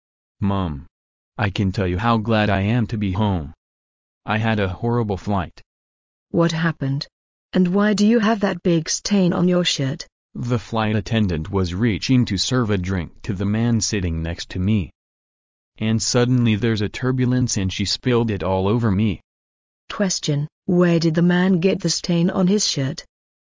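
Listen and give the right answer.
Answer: On the plane, when the flight attendant spilled a drink on him during turbulence

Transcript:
I can't tell you how glad I am to be home. I had a horrible flight. W: What happened? And why do you have that big stain on your shirt? M: The flight attendant was reaching to serve a drink to the man sitting next to me, and suddenly there's a turbulence and she spilled it all over me. Question: Where did the man get the stain on his shirt?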